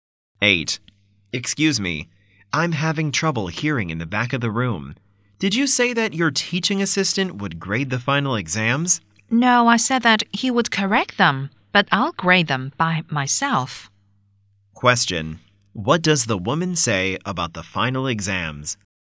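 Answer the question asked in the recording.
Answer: The assistant will correct them but she will grade them herself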